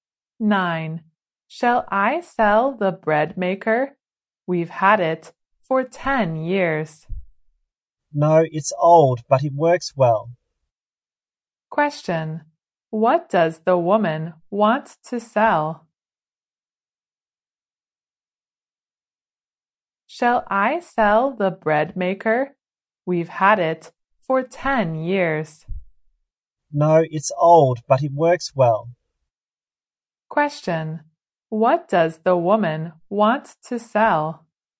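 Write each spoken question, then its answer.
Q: What does the woman want to sell?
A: The bread maker.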